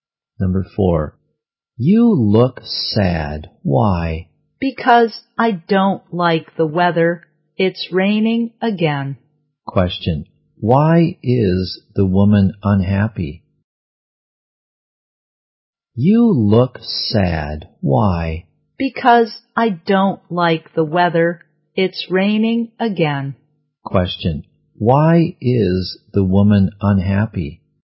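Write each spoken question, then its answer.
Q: why is the woman unhappy?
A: Because it's raining again.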